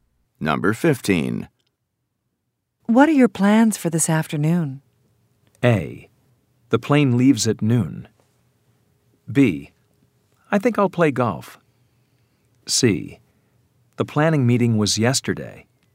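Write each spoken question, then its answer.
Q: What are your plans for this afternoon?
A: B: I think I'll play golf.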